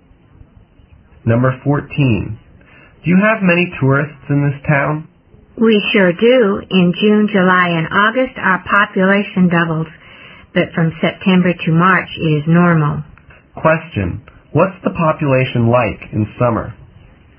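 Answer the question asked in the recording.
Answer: It doubles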